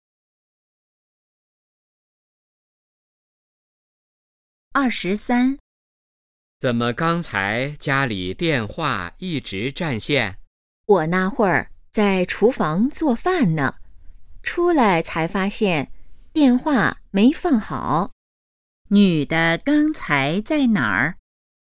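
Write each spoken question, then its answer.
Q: 女的刚才在哪儿?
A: 厨房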